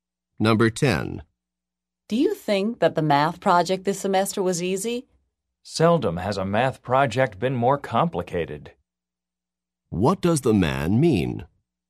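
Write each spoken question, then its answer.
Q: What does the man mean?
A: The project was very complicated, not easy.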